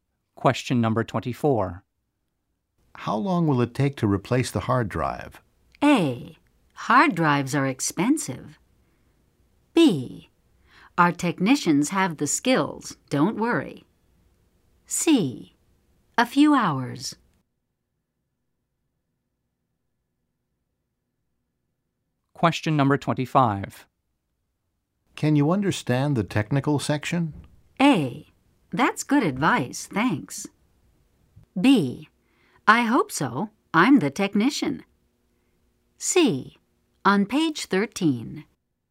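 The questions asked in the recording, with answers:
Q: How long will it take to replace the hard drive?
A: C: A few hours.

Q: Can you understand the technical section?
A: B: I hope so. I'm the technician.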